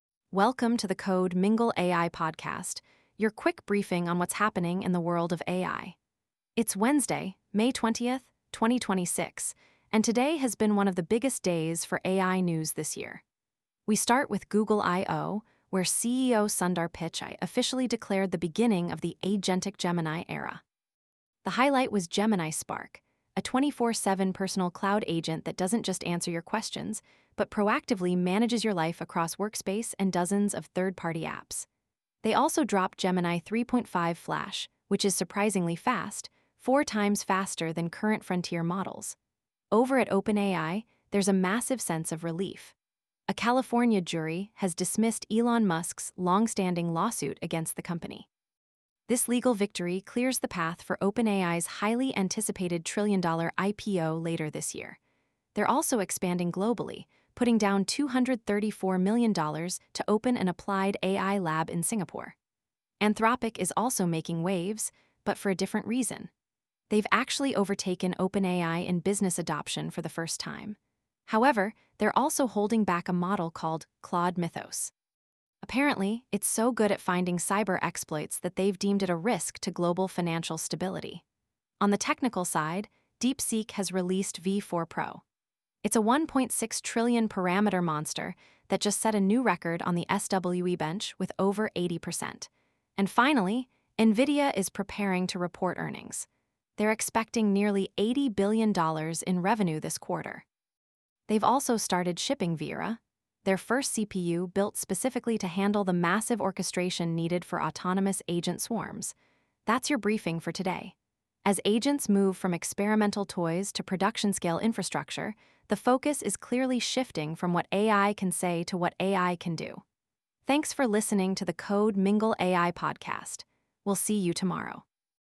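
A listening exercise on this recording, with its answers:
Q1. Which Google model is reportedly 4x faster than other frontier models as of May 2026?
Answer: Gemini 3.5 Flash

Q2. What is the name of Anthropic's restricted model that raised concerns about global financial stability?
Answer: Claude Mythos

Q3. Which hardware company released the 'Vera' CPU for AI agent orchestration?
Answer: NVIDIA

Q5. OpenAI recently announced a $234 million investment in which country?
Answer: Singapore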